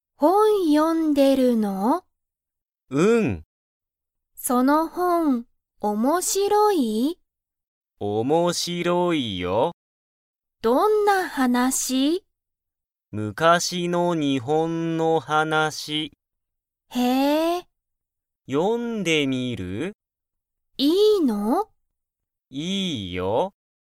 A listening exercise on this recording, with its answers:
その本(ほん)は面白(おもしろ)いですか?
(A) はい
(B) いいえ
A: はい

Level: Level 1

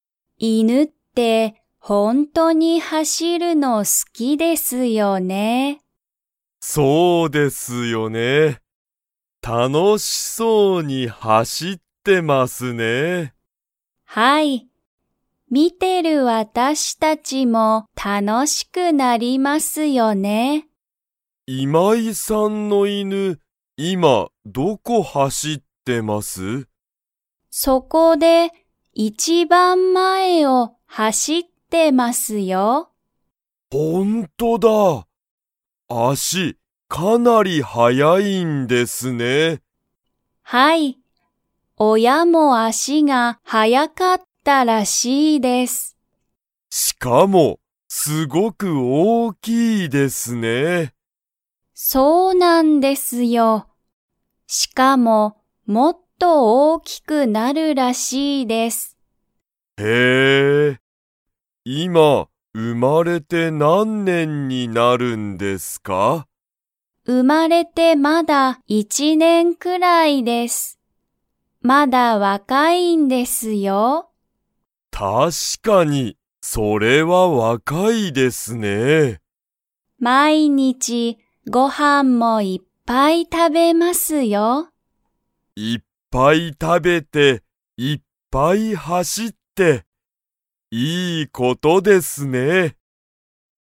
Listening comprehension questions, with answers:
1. 今井(いまい)さんの犬(いぬ)は、今(いま)____走(はし)っている。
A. 足(あし)が早(はや)く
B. 一年いちねんくらい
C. 親(おや)と一緒(いっしょ)に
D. 一番前いちばんまえを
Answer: 一番前いちばんまえを

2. 今井いまいさんの犬いぬは、もっと大おおきくなりそうですか?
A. はい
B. いいえ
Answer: はい

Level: Level 2

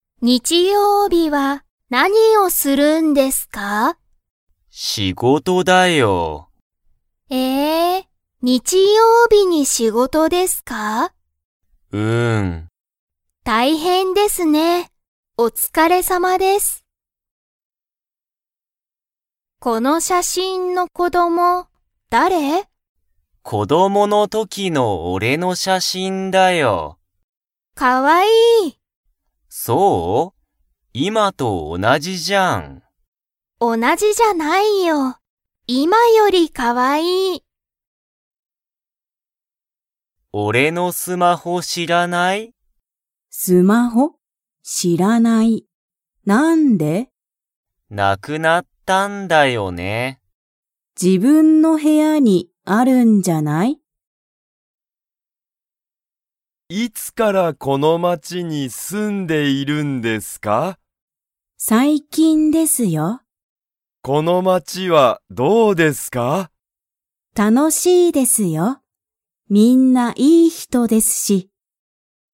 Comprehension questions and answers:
Comprehension Quiz (Skip if you don't understand the conversation yet)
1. 松本(まつもと)さんは、日曜日(にちようび)に仕事(しごと)をしますか?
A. はい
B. いいえ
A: はい

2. この写真(しゃしん)の子供(こども)は、____だ。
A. ゆうたの子供(こども)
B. かおりの子供(こども)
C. 子供(こども)の時(とき)のゆうた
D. 子供(こども)の時(とき)のかおり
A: 子供(こども)の時(とき)のゆうた

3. ゆうたは、____がない。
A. お金かね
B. 時間じかん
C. 写真(しゃしん)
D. スマホ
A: スマホ

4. 木村(きむら)さんは、かなり前(まえ)からこの町(まち)に住(す)んでいますか?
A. はい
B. いいえ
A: いいえ

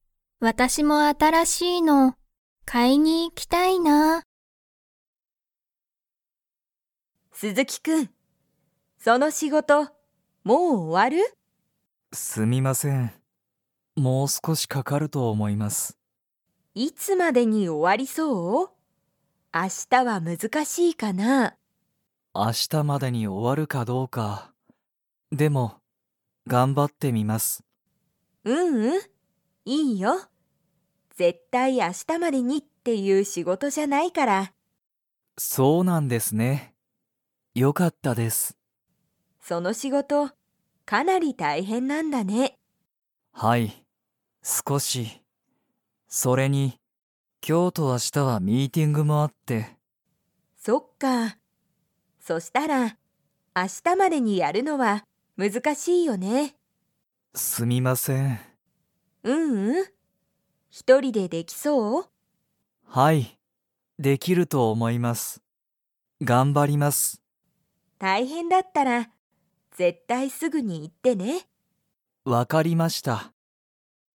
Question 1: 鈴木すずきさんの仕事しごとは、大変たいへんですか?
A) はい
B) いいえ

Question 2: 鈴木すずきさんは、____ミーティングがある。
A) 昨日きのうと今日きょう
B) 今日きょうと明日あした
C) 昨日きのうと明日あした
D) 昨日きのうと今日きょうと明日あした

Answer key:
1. はい
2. 今日きょうと明日あした

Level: Level 2

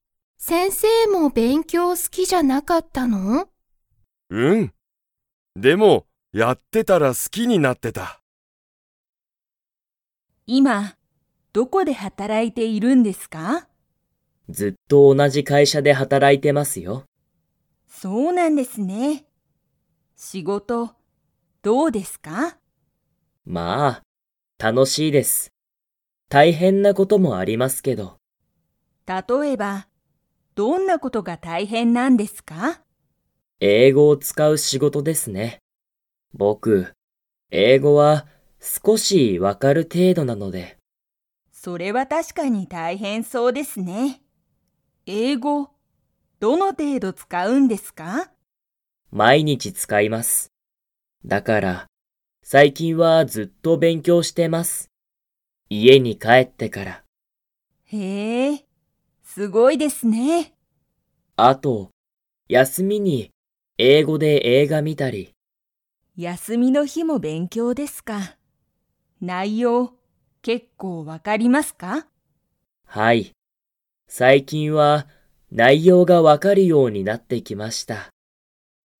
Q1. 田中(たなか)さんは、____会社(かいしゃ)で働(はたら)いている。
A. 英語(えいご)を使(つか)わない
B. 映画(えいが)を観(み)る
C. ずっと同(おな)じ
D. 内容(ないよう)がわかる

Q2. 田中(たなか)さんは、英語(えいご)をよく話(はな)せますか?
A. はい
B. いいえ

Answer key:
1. ずっと同(おな)じ
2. いいえ

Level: Level 2

